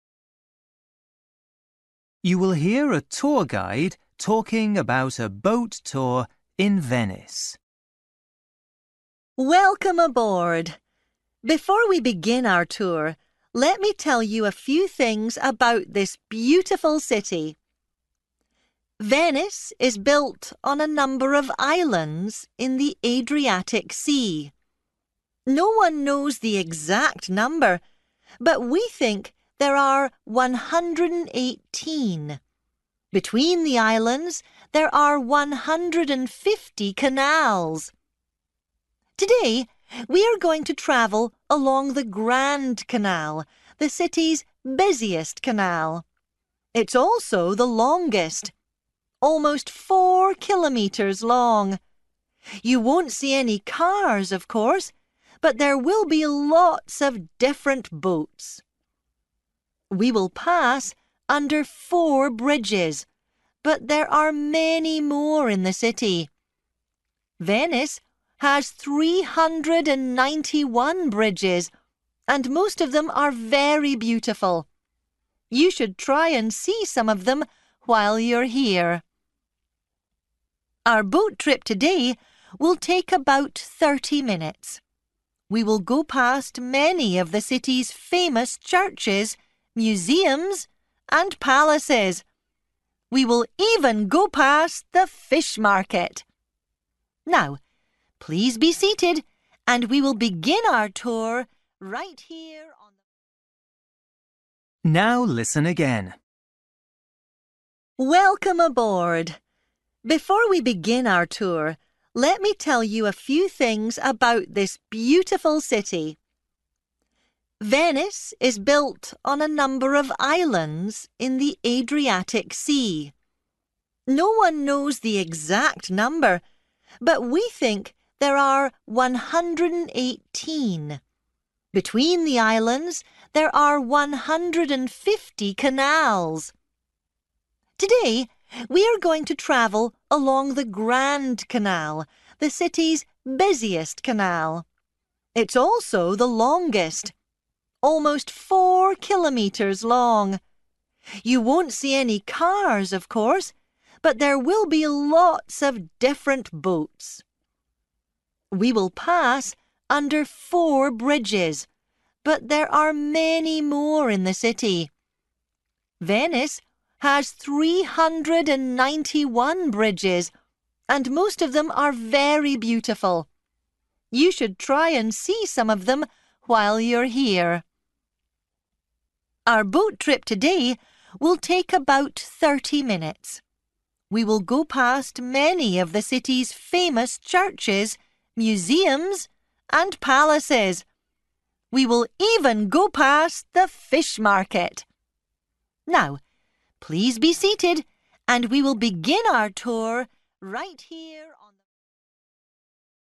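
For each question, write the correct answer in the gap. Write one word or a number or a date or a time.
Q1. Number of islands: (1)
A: 118

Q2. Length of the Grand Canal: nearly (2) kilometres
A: 4

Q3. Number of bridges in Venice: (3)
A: 391

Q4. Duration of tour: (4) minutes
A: 30

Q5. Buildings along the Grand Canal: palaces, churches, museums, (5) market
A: fish

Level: Luyện nghe trình độ A2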